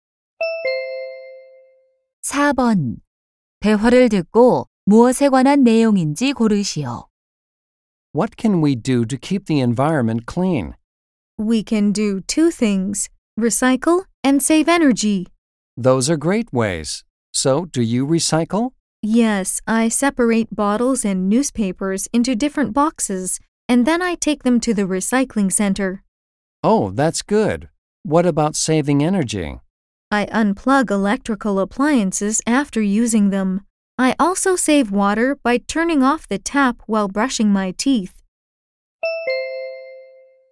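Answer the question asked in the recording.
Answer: 환경 보호 방법(재활용과 에너지 절약)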